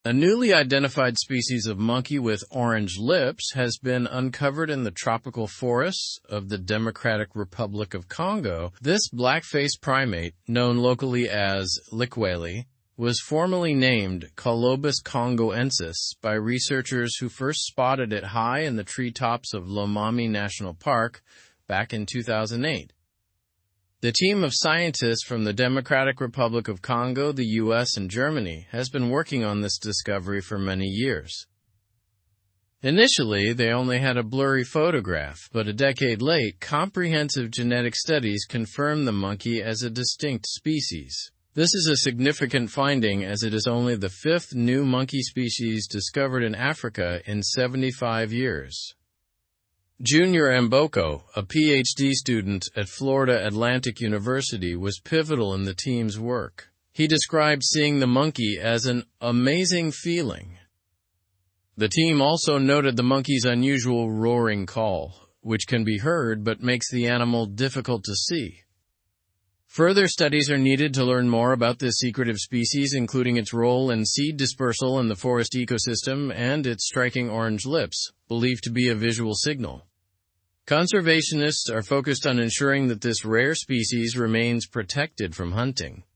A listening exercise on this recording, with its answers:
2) What is the local name for the newly discovered monkey?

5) What unique feature does the monkey have?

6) What sound does the monkey make?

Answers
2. Locally, the monkey is known as 'Likweli'.
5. The monkey has striking orange lips.
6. The monkey makes an unusual roaring call.

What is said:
A newly identified species of monkey with orange lips has been uncovered in the tropical forests of the Democratic Republic of Congo. This black-faced primate, known locally as 'Likweli', was formally named 'Colobus congoensis' by researchers who first spotted it high in the treetops of Lomami National Park back in 2008.
The team of scientists from the Democratic Republic of Congo, the U.S., and Germany has been working on this discovery for many years. Initially, they only had a blurry photograph, but a decade late, comprehensive genetic studies confirmed the monkey as a distinct species. This is a significant finding as it is only the fifth new monkey species discovered in Africa in 75 years.
Junior Amboko, a PhD student at Florida Atlantic University, was pivotal in the team's work. He described seeing the monkey as an "amazing feeling". The team also noted the monkey's unusual roaring call, which can be heard but makes the animal difficult to see.
Further studies are needed to learn more about this secretive species, including its role in seed dispersal in the forest ecosystem and its striking orange lips, believed to be a visual signal. Conservationists are focused on ensuring that this rare species remains protected from hunting.

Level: Level 3